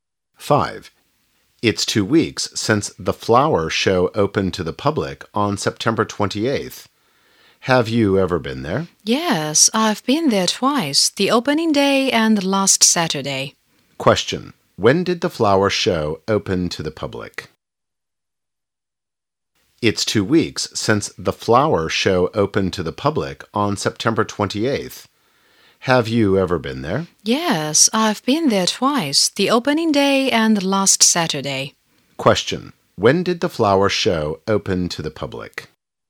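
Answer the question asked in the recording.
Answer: On September 28th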